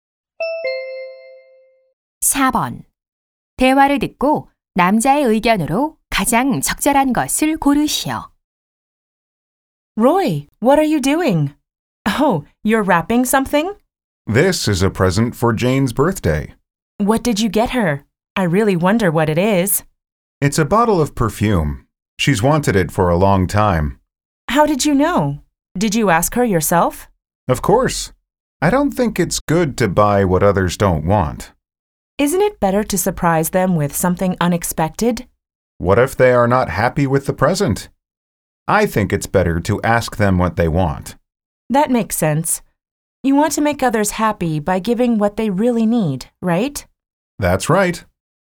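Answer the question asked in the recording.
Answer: 선물은 받는 사람에게 원하는 것을 물어보고 사는 것이 좋다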